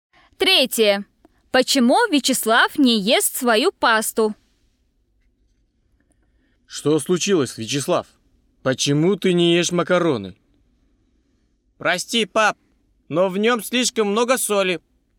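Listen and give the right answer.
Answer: Слишком много соли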